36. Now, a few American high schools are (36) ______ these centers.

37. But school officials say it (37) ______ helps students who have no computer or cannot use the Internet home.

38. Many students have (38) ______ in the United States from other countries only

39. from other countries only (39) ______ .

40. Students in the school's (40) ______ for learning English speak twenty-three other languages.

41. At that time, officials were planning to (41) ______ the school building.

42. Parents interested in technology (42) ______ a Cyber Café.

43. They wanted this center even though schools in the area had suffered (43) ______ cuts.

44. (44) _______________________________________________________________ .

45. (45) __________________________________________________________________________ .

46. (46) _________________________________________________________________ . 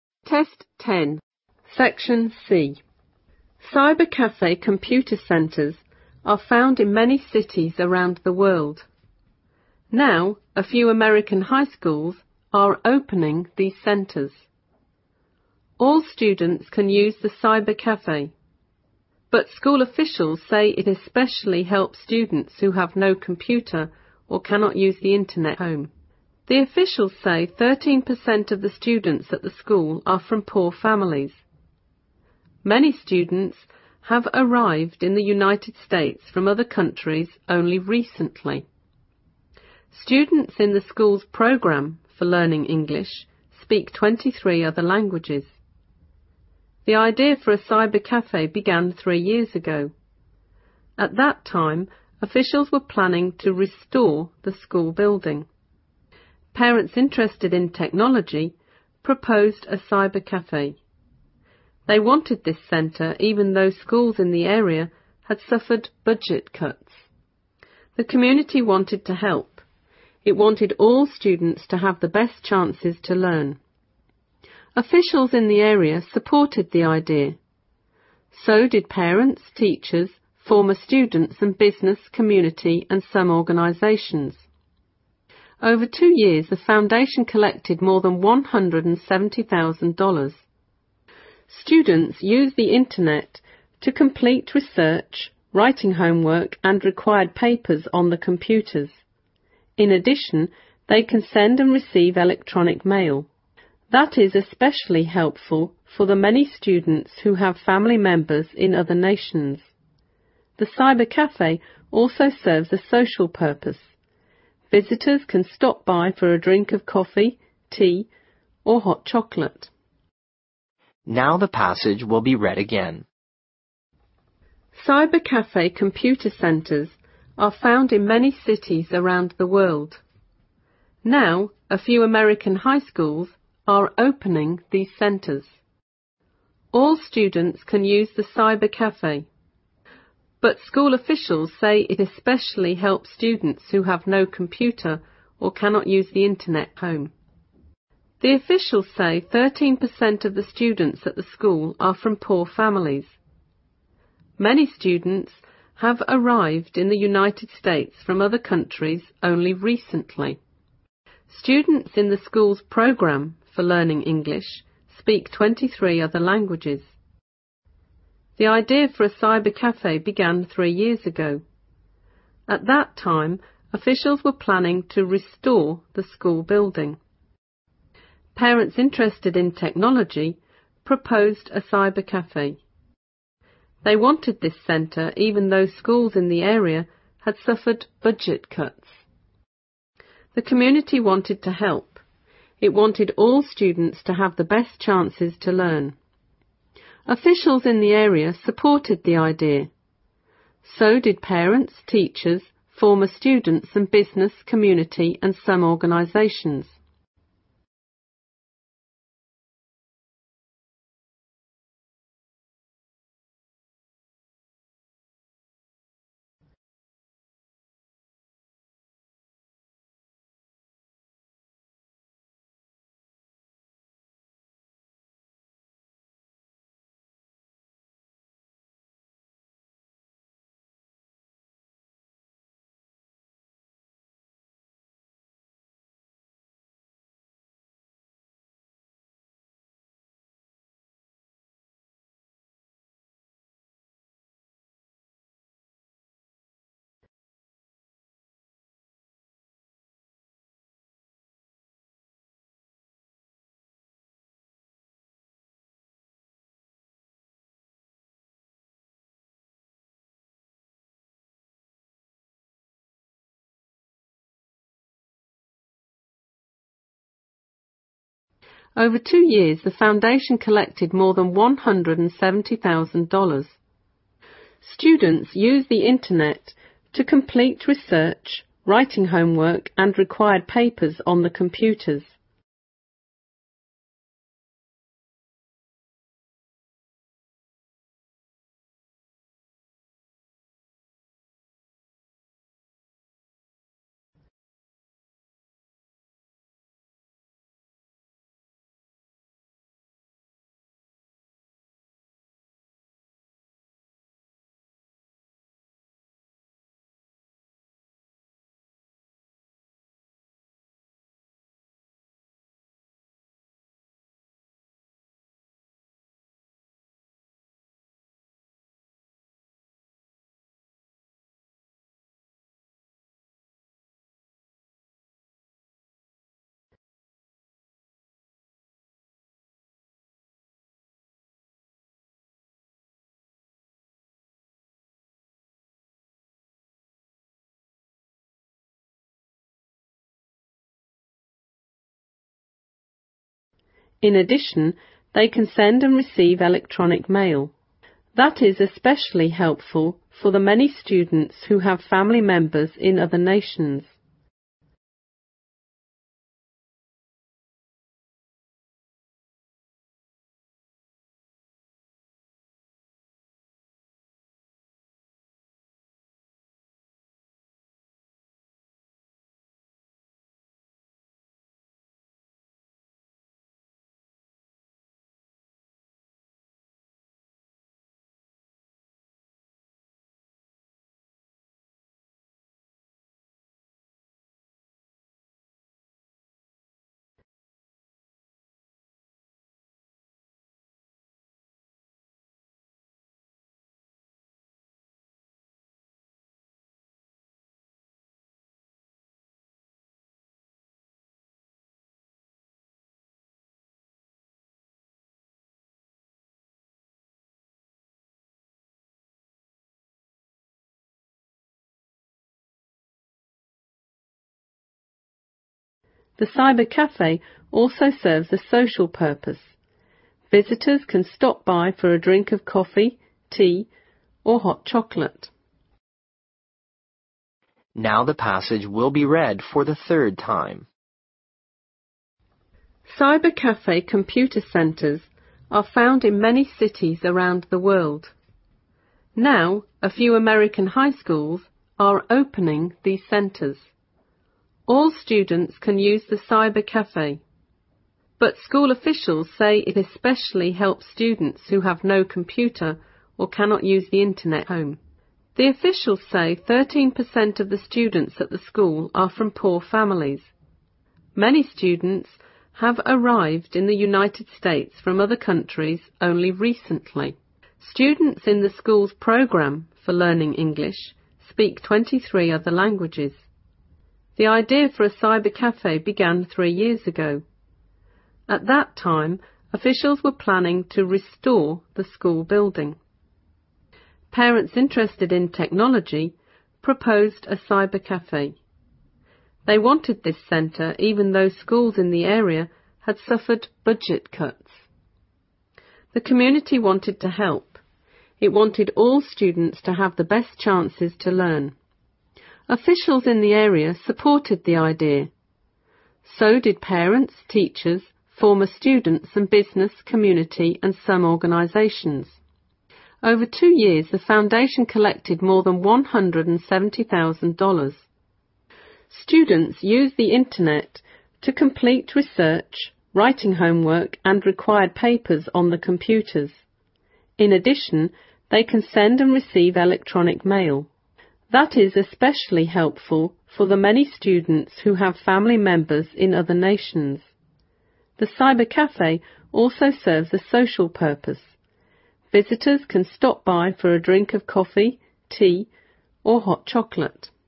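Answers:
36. opening
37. especially
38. arrived
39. recently
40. program
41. restore
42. proposed
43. budget
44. So did parents, teachers, former students and business, community and some organizations.
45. Students use the Internet to complete research, writing homework and required papers on the computers.
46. That is especially helpful for the many students who have family members in other nations.

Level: 四级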